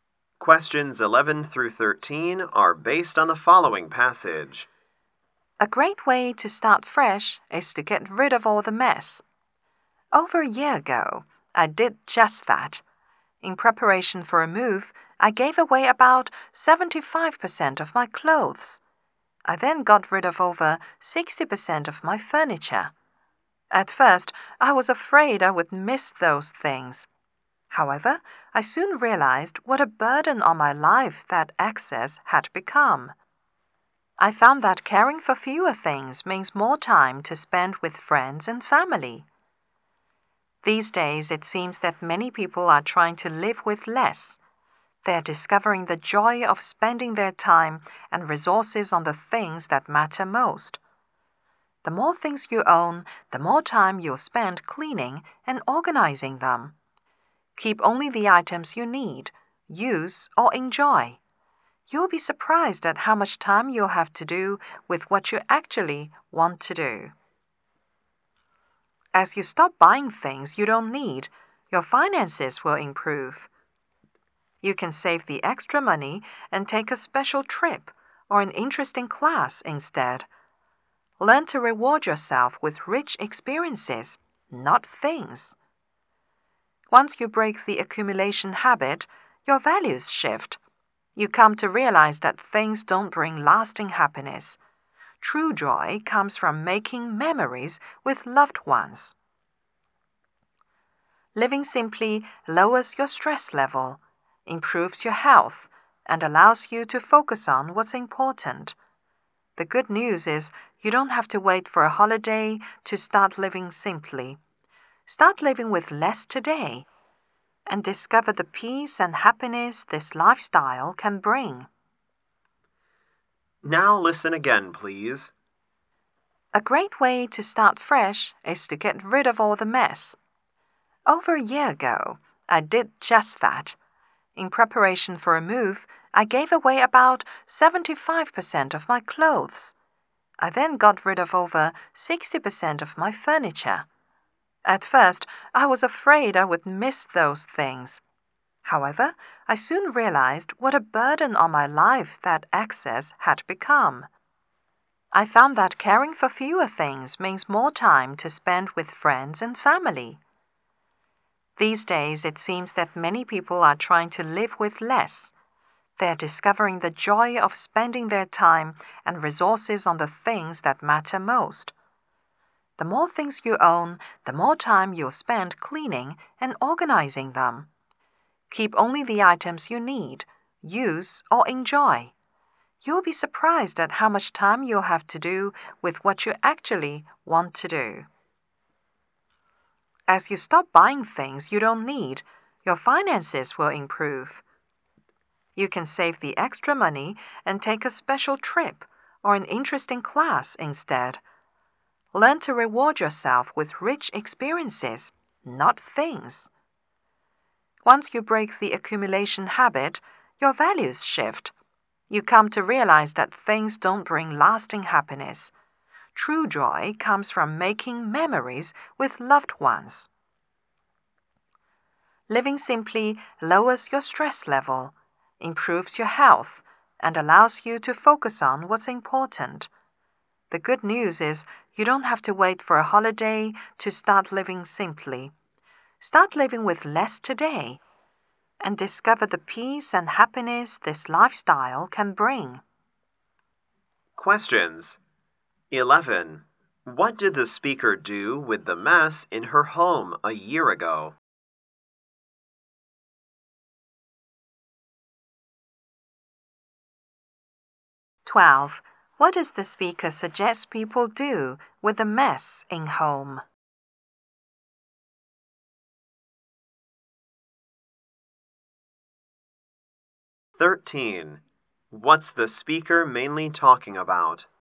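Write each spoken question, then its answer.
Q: What did the speaker do with the mess in her home a year ago?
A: She gave away most of her clothes and furniture.

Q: What does the speaker suggest people do with the mess in home?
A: Keep only the items they need, use, or enjoy.

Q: What's the speaker mainly talking about?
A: The benefits of living simply with less.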